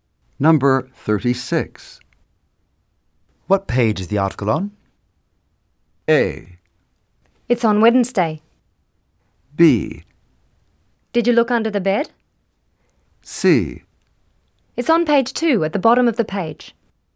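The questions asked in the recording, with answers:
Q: What page is the article on?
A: C: It's on page 2, at the bottom of the page.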